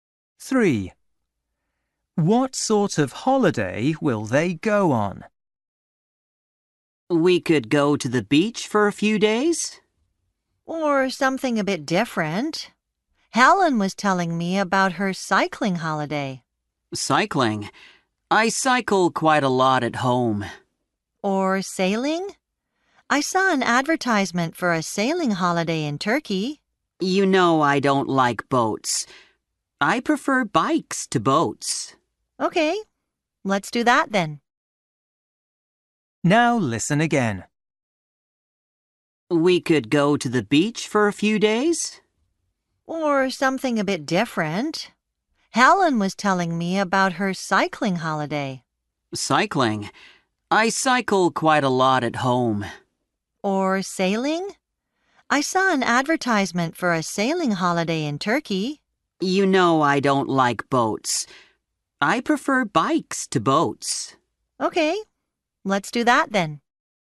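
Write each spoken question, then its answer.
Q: What sort of holiday will they go on?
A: A cycling holiday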